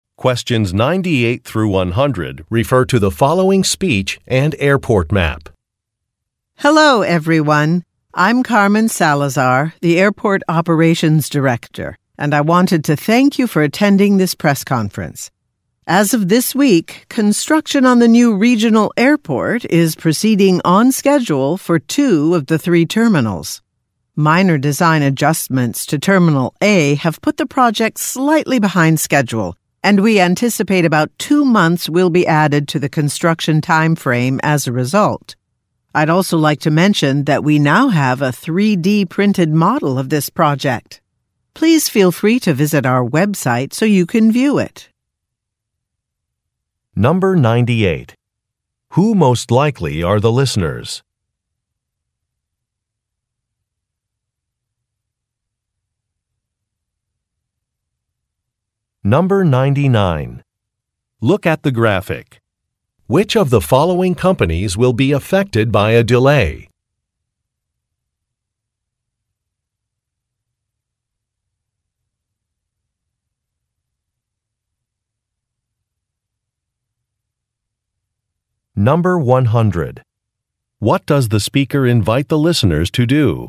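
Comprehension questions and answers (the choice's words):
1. Who most likely are the listeners?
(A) Civil engineers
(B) Urban planners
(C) News reporters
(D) Safety inspectors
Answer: News reporters

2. What does the speaker invite the listeners to do?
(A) Download some designs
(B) Look at a model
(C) Take a site tour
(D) View a Webcam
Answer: Look at a model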